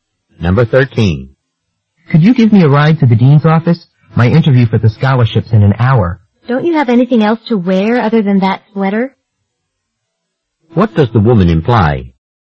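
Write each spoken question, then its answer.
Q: What does the woman imply?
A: The man should wear something more formal than the sweater.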